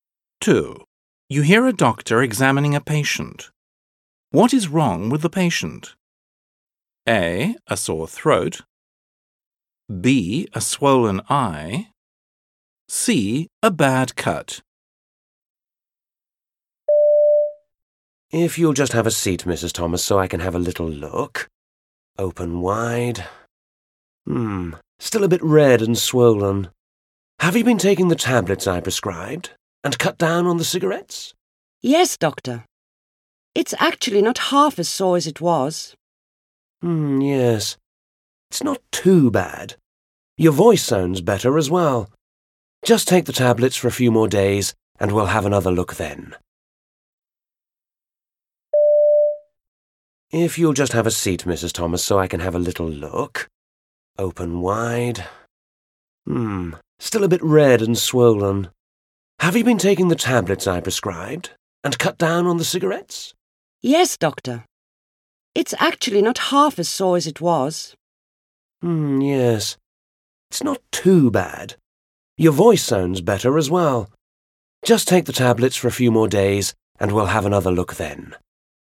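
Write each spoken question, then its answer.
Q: What is wrong with the patient? A. A sore throat. B. A swollen eye. C. A bad cut.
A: A: A sore throat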